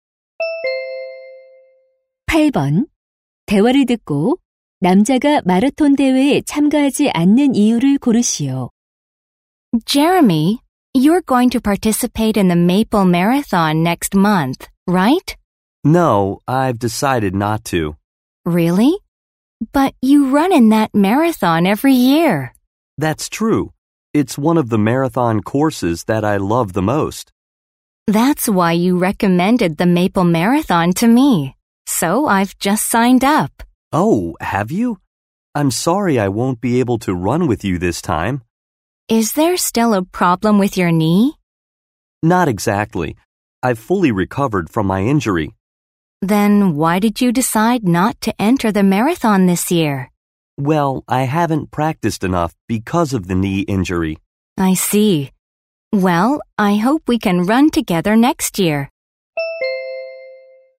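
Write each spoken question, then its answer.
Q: 대화를 듣고 남자가 마라톤 대회에 참가하지 않는 이유를 고르시오.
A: 무릎 부상 때문에 연습을 충분히 하지 못해서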